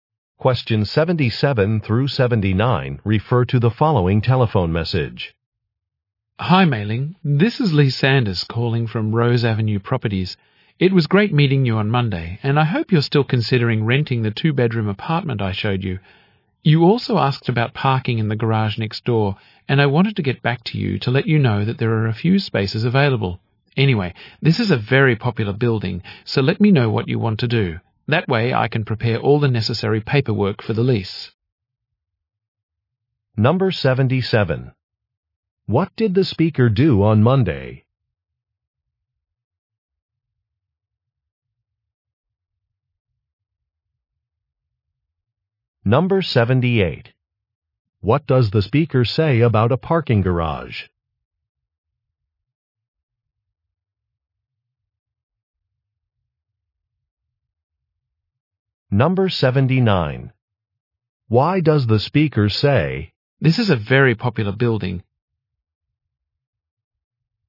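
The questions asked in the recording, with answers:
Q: What did the speaker do on Monday?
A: Showed an apartment to the listener

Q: What does the speaker say about a parking garage?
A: A few spaces are available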